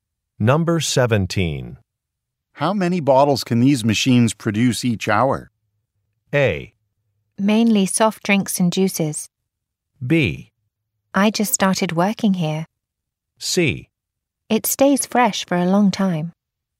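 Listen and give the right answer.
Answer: B: I just started working here.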